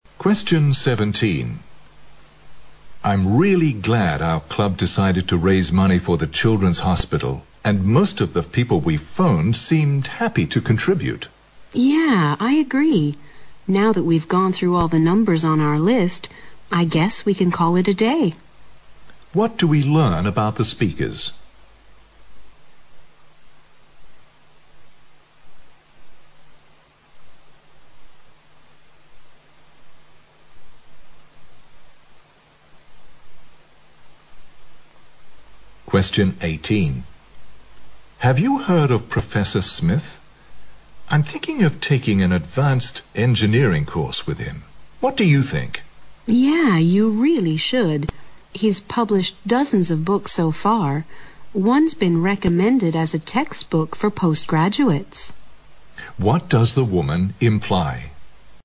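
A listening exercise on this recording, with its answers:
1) What do we learn about the speakers?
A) They seem satisfied with what they have done.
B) They have called all club members to contribute.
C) They think the day can be called a memorable one.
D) They find it hard to raise money for the hospital.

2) What does the woman imply?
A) The man shouldn't hesitate to take the course.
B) The man should talk with the professor first.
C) The course isn't open to undergraduates.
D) The course will require a lot of reading.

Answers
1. A
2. A

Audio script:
M: I'm really glad our club decided to raise money for the children's hospital. And most of the people we phoned seemed happy to contribute.
W: Yeah! I agree. Now that we've gone through all the numbers on our list, I guess we can call it a day.
Q: What do we learn about the speakers?
M: Have you heard of Professor Smith? I'm thinking of taking an advanced engineering course with him. 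What do you think?
W: Yeah! You really should. He's published dozens of books so far, once been recommended as a textbook for postgraduates.
Q: What does the woman imply?

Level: 六级

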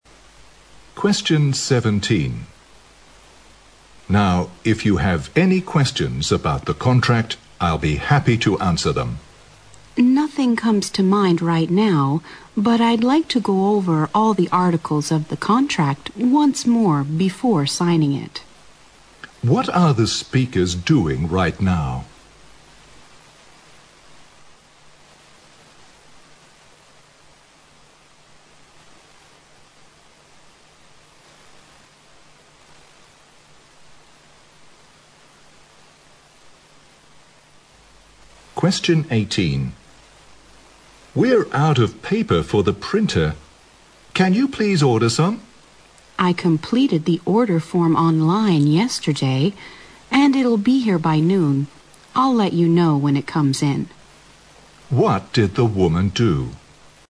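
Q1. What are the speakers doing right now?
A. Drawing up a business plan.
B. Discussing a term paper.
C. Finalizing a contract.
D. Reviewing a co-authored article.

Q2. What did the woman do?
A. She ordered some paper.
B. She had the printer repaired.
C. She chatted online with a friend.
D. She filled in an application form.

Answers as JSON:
{"1": "C", "2": "A"}

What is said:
M: Now if you have any questions about the contract. I'll be happy to answer them.
W: Nothing comes to mind right now, but I'd like to go over all the articles of the contract once more before signing it.
Q: What are the speakers doing right now?
M: We are out of paper for the printer. Can you please order some?
W: I completed the order form online yesterday and it will be here by noon. I'll let you know when it comes in.
Q: What did the woman do?

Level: 大学英语四级

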